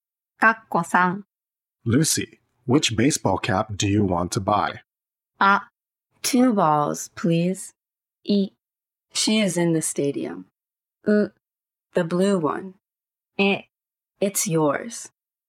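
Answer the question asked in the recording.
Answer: う: The blue one.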